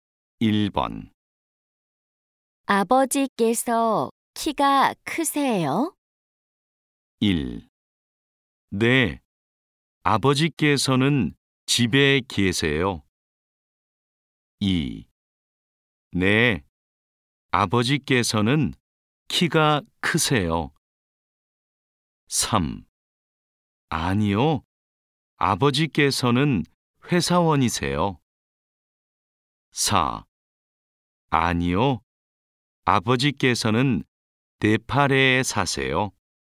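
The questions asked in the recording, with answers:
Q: 아버지께서 키가 크세요?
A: 2: 네, 아버지께서는 키가 크세요.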